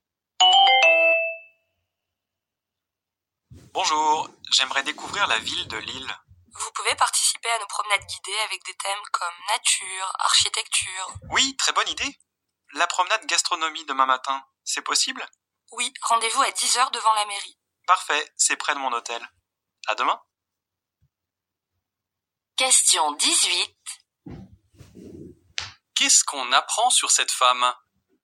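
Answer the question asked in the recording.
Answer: Elle fera la promenade gastronomie demain à 10h; son hôtel est près de la mairie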